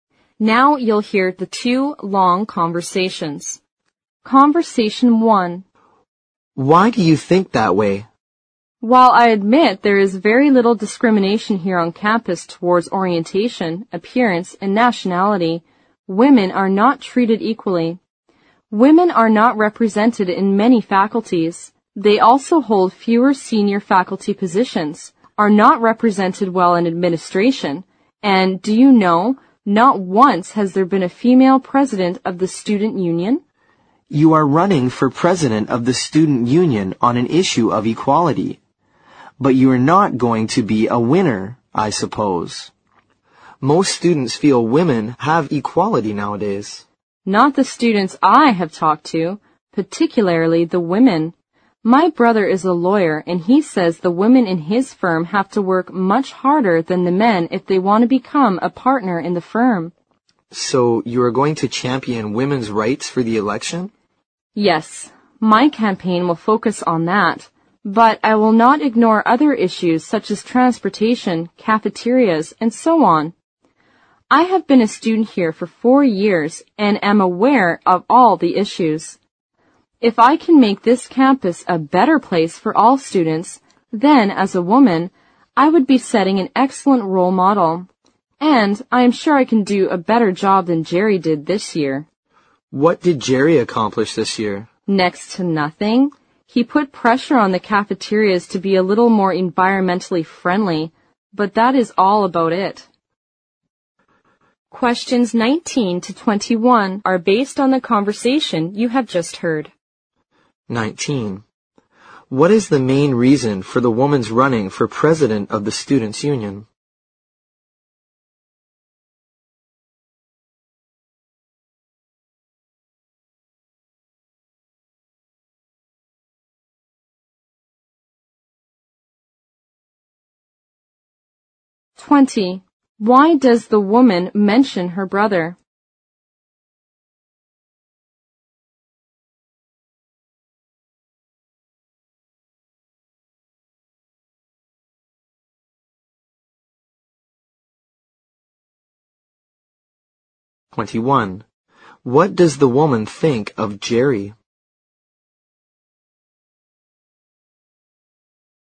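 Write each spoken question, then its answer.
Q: What is the main reason for the woman's running for president of the students' union?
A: To fight for equality for women on campus

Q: Why does the woman mention her brother?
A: To show that women have to work harder than men to be promoted

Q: What does the woman think of Jerry?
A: He accomplished next to nothing as president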